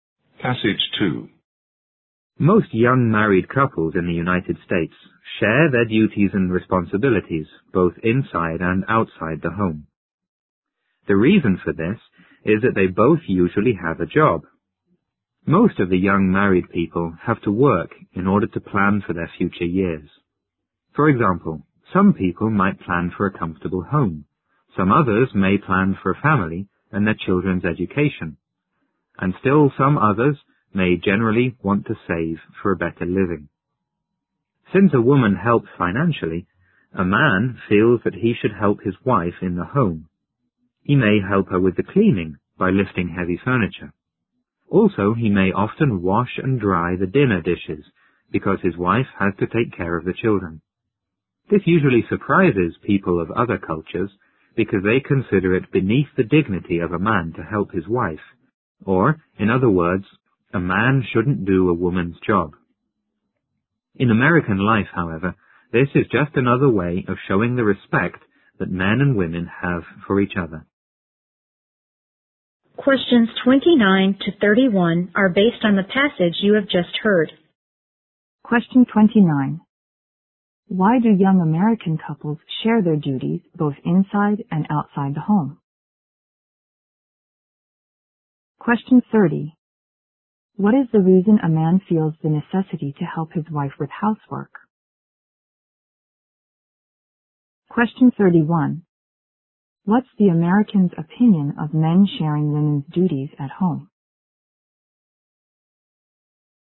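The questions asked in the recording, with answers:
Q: Why do young American couples share their duties both inside and outside the home?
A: Because they both usually have a job.

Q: What is the reason a man feels the necessity to help his wife with housework?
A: Because his wife helps financially.

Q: What's the American's opinion of men sharing women's duties at home?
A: It shows the respect men and women have for each other.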